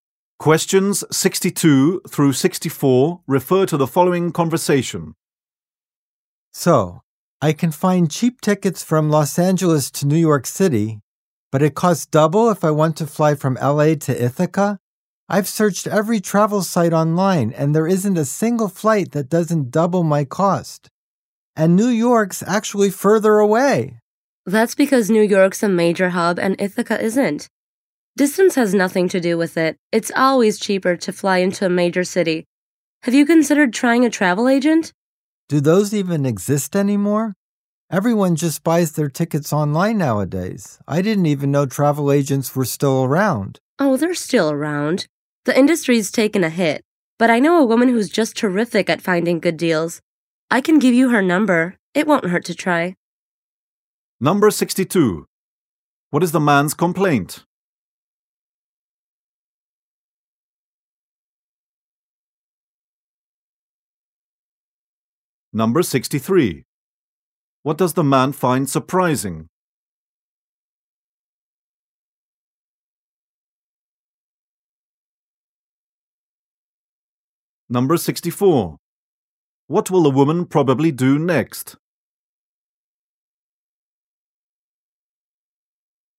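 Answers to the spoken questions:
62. Flying to Ithaca costs double the fare to New York
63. That travel agents still exist
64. Give him a travel agent's number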